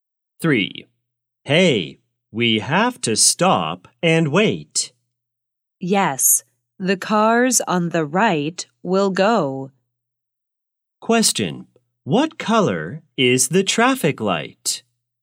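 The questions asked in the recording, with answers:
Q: What color is the traffic light?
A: Red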